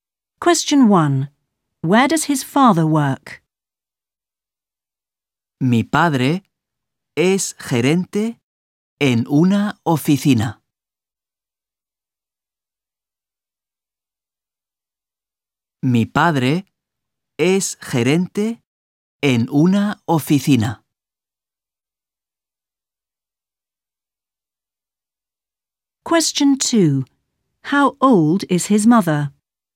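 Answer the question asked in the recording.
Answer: In an office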